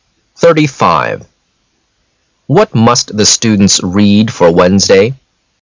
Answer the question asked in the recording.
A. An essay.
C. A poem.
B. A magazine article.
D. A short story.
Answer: D. A short story.